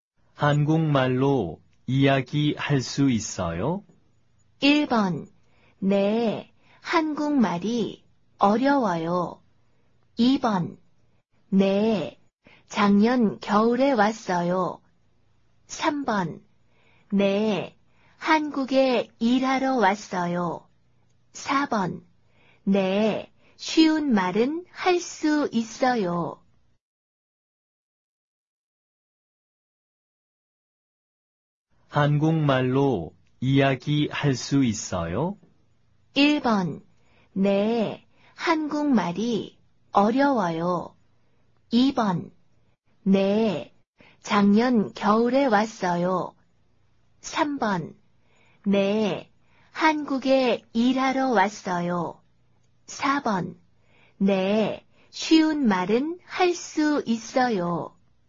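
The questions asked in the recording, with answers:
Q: 한국말로 이야기할 수 있어요?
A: 4: 네, 쉬운 말은 할 수 있어요.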